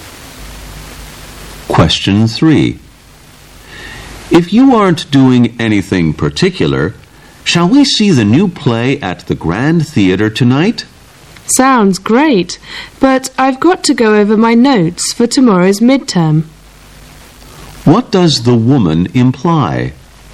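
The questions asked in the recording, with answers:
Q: What does the woman imply?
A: She can't go to the play because she has to review her notes for tomorrow's midterm.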